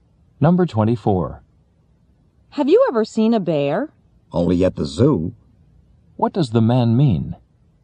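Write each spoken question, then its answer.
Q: What does the man mean?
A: He has seen a bear only at the zoo.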